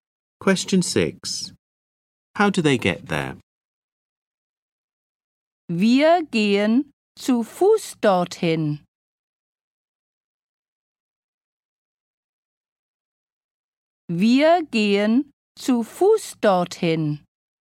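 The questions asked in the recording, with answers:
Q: How do they get there?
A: On foot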